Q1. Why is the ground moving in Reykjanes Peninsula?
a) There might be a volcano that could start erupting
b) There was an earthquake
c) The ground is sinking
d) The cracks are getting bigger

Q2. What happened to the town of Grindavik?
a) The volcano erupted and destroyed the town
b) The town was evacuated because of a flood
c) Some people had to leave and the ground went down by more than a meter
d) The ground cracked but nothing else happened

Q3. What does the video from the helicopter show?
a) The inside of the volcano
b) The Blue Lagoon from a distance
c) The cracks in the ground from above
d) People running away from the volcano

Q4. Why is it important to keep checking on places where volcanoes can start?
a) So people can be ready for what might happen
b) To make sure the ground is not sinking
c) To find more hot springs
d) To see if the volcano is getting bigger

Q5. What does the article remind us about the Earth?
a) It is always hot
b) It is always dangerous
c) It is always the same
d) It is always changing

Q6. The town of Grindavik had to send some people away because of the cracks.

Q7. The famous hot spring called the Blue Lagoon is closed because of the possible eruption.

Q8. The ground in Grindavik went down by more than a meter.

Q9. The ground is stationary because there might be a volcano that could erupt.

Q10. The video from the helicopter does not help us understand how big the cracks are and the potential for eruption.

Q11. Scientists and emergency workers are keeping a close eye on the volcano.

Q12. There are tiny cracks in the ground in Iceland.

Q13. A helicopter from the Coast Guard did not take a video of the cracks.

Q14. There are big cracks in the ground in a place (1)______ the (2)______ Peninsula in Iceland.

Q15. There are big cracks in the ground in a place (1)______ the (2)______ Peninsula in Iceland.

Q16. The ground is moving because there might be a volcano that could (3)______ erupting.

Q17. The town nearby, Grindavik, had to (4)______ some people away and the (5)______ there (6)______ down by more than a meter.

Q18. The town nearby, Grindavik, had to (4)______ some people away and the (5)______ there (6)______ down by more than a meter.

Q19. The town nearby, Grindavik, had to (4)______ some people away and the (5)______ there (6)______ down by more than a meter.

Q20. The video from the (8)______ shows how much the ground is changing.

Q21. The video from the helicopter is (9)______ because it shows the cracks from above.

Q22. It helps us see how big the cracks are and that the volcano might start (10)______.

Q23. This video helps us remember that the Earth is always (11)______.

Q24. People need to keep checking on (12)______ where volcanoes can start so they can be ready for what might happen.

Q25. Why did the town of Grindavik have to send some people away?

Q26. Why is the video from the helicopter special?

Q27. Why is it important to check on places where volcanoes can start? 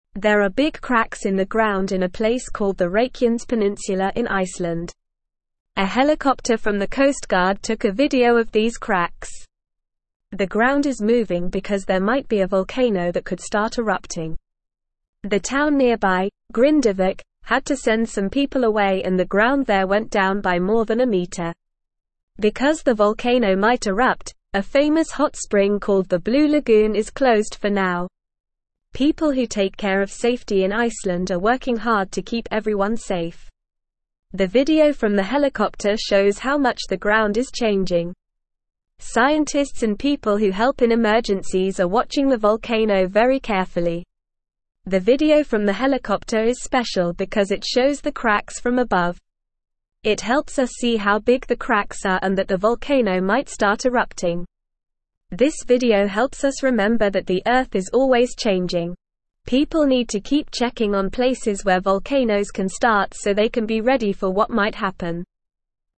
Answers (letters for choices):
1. a
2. c
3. c
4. a
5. d
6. True
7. True
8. True
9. False
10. False
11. True
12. False
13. False
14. called
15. Reykjanes
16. start
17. send
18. ground
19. went
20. helicopter
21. special
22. erupting
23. changing
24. places
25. The town of Grindavik had to send some people away because the ground was moving and it wasn't safe for them to stay there.
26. The video from the helicopter is special because it shows the cracks from above, giving us a better view of how big they are. It helps us understand the situation better.
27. It is important to check on places where volcanoes can start so that people can be prepared for any possible eruptions. It helps keep everyone safe and gives them time to evacuate if needed.

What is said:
There are big cracks in the ground in a place called the Reykjanes Peninsula in Iceland. A helicopter from the Coast Guard took a video of these cracks. The ground is moving because there might be a volcano that could start erupting. The town nearby, Grindavik, had to send some people away and the ground there went down by more than a meter.
Because the volcano might erupt, a famous hot spring called the Blue Lagoon is closed for now. People who take care of safety in Iceland are working hard to keep everyone safe. The video from the helicopter shows how much the ground is changing. Scientists and people who help in emergencies are watching the volcano very carefully.
The video from the helicopter is special because it shows the cracks from above. It helps us see how big the cracks are and that the volcano might start erupting. This video helps us remember that the Earth is always changing. People need to keep checking on places where volcanoes can start so they can be ready for what might happen.

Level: Level 2